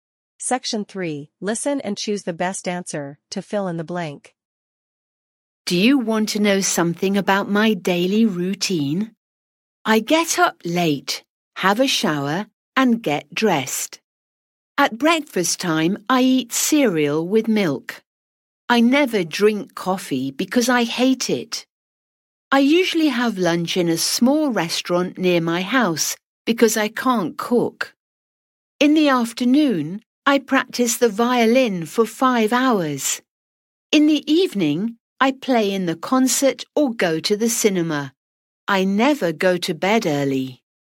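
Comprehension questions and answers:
Listen and choose the best answer to fill in the blank.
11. Do you want to know something about my daily (11) _________?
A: routine

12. I get up late, have a (12) __________, and get (13) __________.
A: shower

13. I get up late, have a (12) __________, and get (13) __________.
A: dressed

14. At breakfast time, I eat (14)__________ with milk.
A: cereal

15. In the afternoon, I practice the (15) ________ for 5 hours.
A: violin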